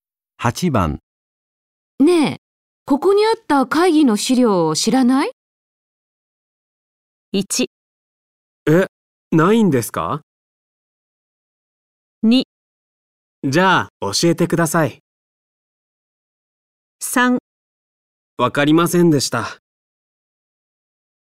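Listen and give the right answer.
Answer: 1: え、ないんですか?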